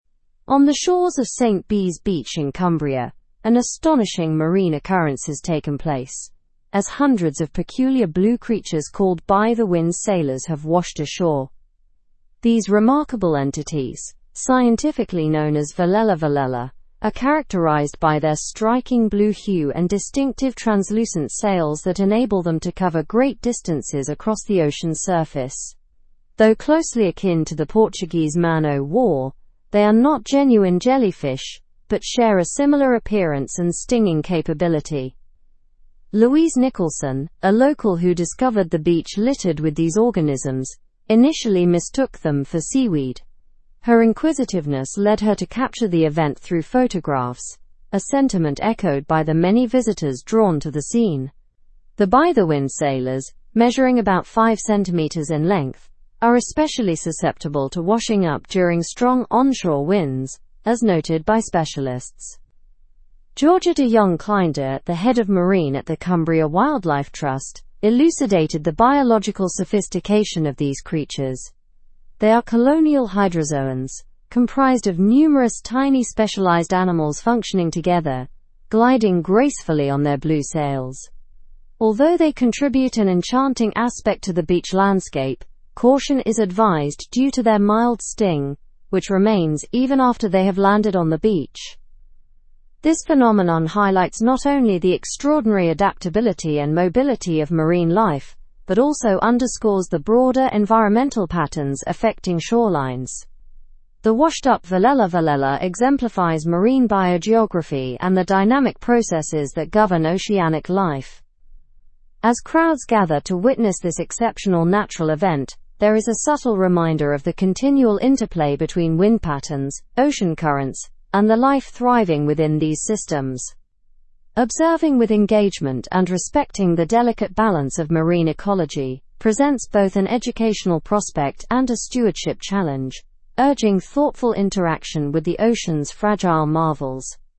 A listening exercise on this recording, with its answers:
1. What creatures have washed ashore on St Bees beach?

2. What are Velella velella distinguished by?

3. How did Louise Nicholson react when she saw the Velella velella?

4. How long are by-the-wind sailors typically?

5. Why should caution be exercised when handling Velella velella?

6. What does this event illustrate about environmental patterns?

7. Who provided expert commentary on this event?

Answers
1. The creatures that washed ashore are called by-the-wind sailors, or Velella velella.
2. They are distinguished by their vibrant blue color and unique translucent sails.
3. She initially mistook them for seaweed but then documented them with photographs.
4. They are about 5 cm in length.
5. Caution is advised because they possess a mild sting.
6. It illustrates the influence of wind patterns and ocean currents on marine life along shorelines.
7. Georgia de Jong Cleyndert from the Cumbria Wildlife Trust provided expert commentary.

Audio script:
On the shores of St Bees beach in Cumbria, an astonishing marine occurrence has taken place, as hundreds of peculiar blue creatures called by-the-wind sailors have washed ashore. These remarkable entities, scientifically known as Velella velella, are characterized by their striking blue hue and distinctive translucent sails that enable them to cover great distances across the ocean's surface.
These remarkable ?, scientifically known as Velella velella, are characterized by their striking blue hue and distinctive translucent sails that enable them to cover great distances across the ocean's surface. Though closely akin to the Portuguese man o' war, they are not genuine jellyfish but share a ? appearance and stinging capability. Louise Nicholson, a local who discovered the beach littered with these organisms, initially mistook them for seaweed. Her inquisitiveness led her to capture the ? through photographs, a sentiment echoed by the many visitors drawn to the scene. The by-the-wind sailors, measuring about 5 cm in length, are ? susceptible to washing up ? strong onshore winds, as noted by specialists. Georgia de Jong Cleyndert, the Head of Marine at the Cumbria Wildlife Trust, elucidated the ? sophistication of these ?. They are colonial hydrozoans, comprised of numerous tiny specialized animals functioning together, gliding gracefully on their blue sails. Although they ? an enchanting aspect to the beach landscape, caution is advised due to their mild ?, which remains even after they have landed on the beach. This phenomenon highlights not only the extraordinary adaptability and mobility of marine life but also underscores the broader environmental patterns affecting shorelines. The washed-up Velella ? exemplifies marine biogeography and the dynamic processes that govern oceanic life. As crowds gather to witness this exceptional natural event, there is a subtle reminder of the continual interplay between wind patterns, ocean currents, and the life thriving within these systems. Observing with engagement and respecting the delicate balance of marine ecology presents both an ? prospect and a stewardship challenge, ? interaction with the ocean's fragile marvels.

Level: Level 4